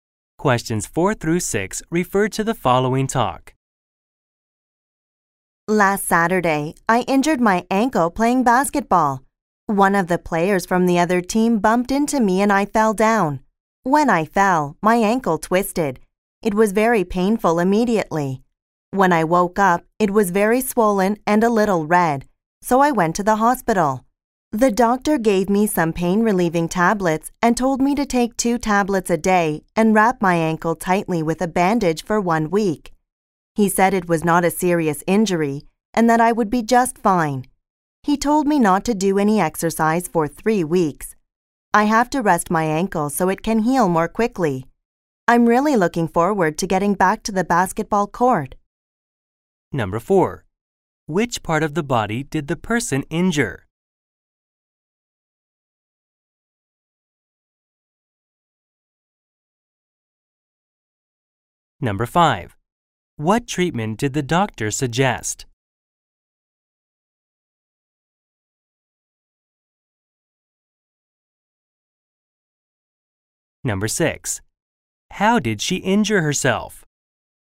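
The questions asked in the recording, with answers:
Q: Which part of the body did the person injure?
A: Her ankle

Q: What treatment did the doctor suggest?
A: Take 2 pain tablets a day, wrap the ankle tightly for 1 week, no exercise for 3 weeks

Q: How did she injure herself?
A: Playing basketball, a player bumped into her and she fell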